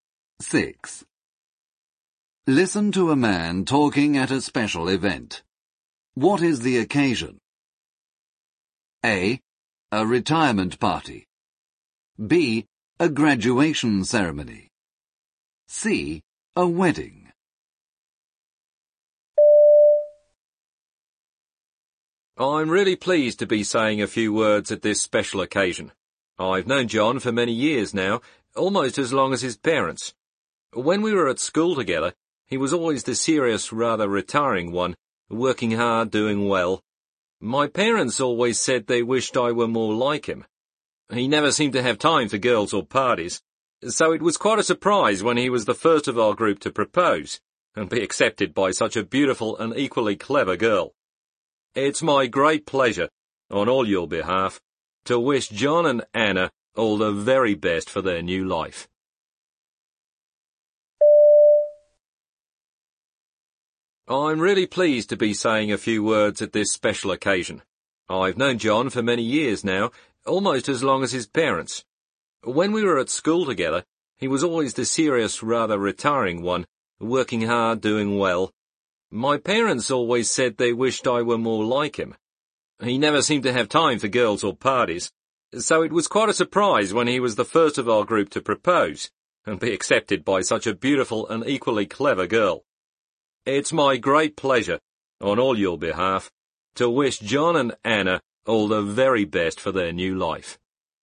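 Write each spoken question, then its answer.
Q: What is the occasion?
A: C: A wedding.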